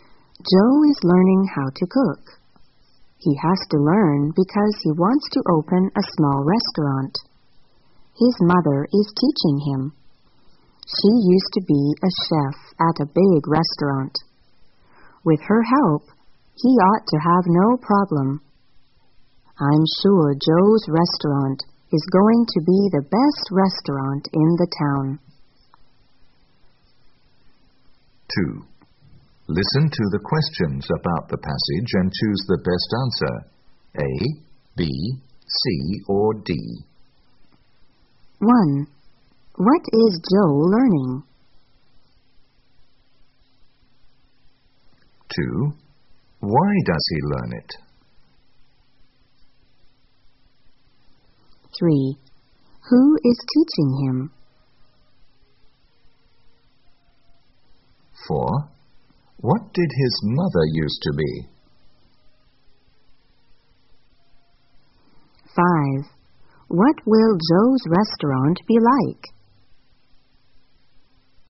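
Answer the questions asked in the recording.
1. How to cook
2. He wants to open a small restaurant
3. His mother
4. A chef at a big restaurant
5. The best restaurant in the town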